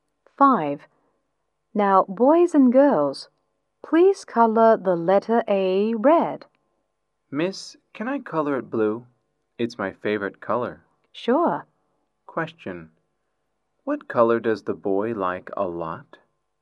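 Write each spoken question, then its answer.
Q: What color does the boy like a lot?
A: Blue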